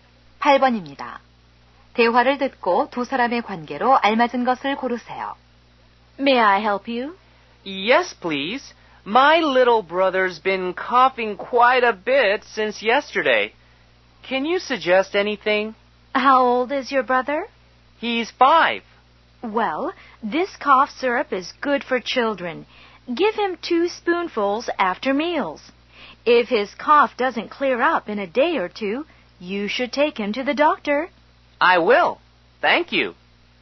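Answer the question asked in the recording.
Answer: 약사와 손님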